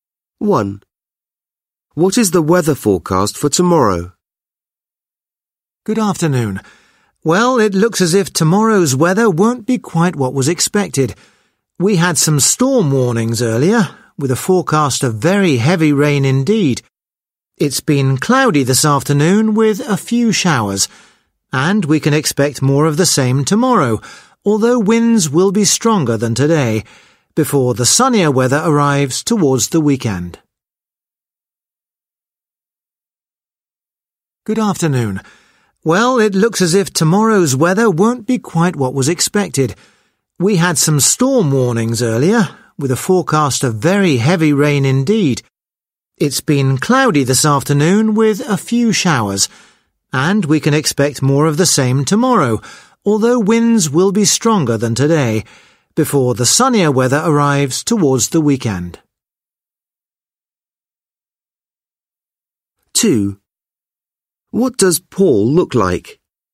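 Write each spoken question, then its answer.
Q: What is the weather forecast for tomorrow?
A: Cloudy with showers and stronger winds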